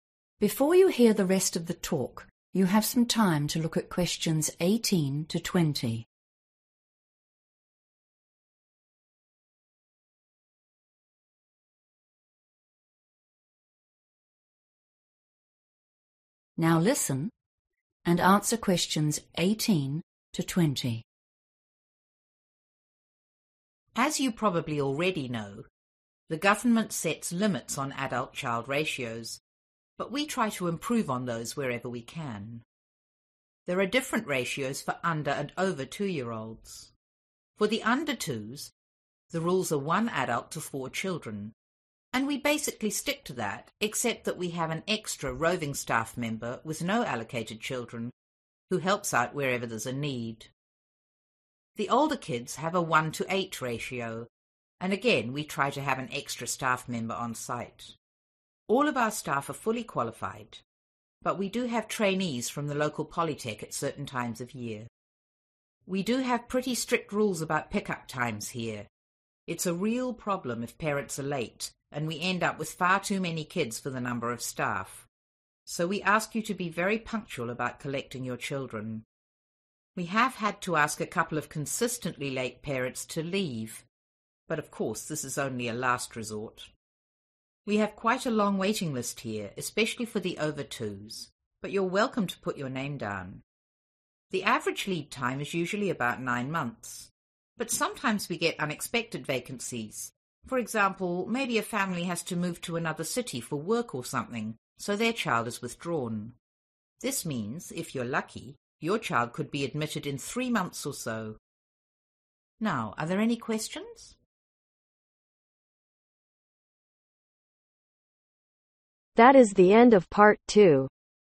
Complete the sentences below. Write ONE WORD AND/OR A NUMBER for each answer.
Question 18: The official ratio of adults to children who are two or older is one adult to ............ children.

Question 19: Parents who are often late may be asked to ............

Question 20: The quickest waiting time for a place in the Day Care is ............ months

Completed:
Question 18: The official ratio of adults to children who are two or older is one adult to 8/Eight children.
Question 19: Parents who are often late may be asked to Leave
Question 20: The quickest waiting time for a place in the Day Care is Three/3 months